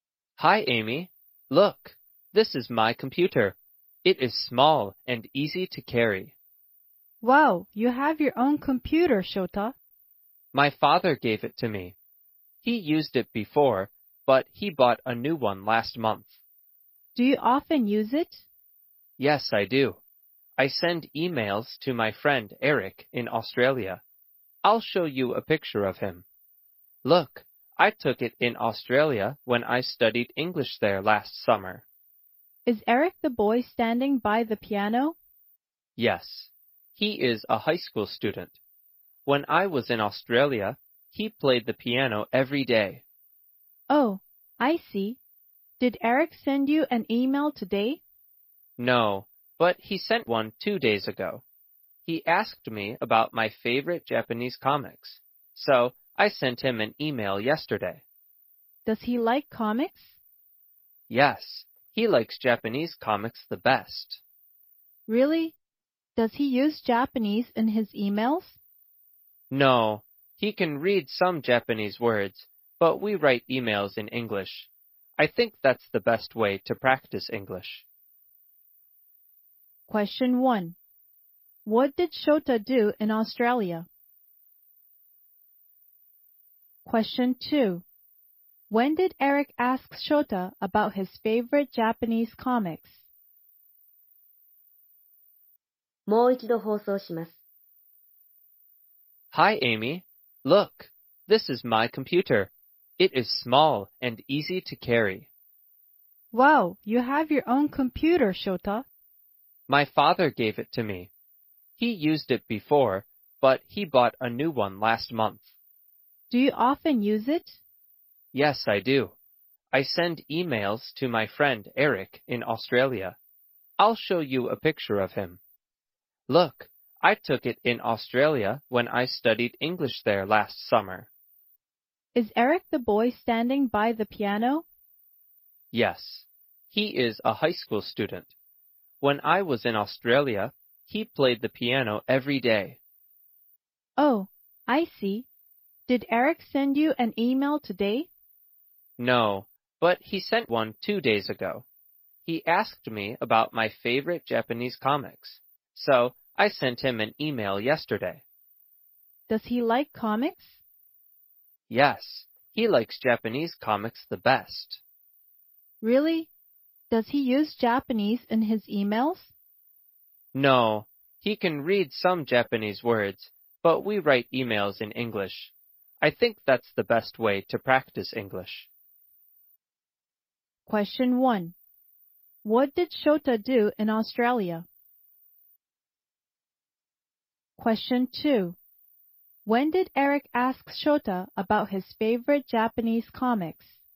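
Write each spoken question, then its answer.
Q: What did Shota do in Australia?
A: He studied English.

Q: When did Eric ask Shota about his favorite Japanese comics?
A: two days ago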